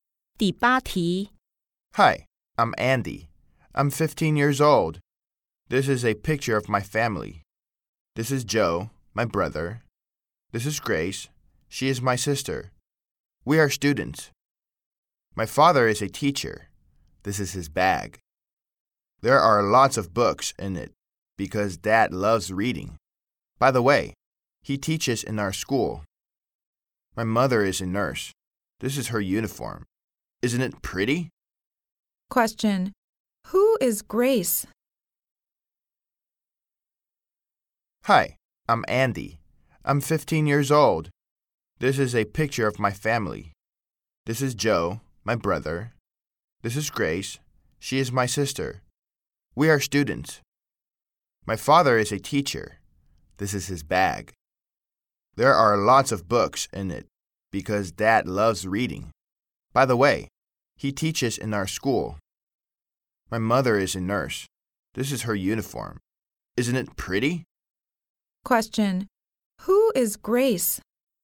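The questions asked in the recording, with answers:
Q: Who is Grace?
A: Andy's sister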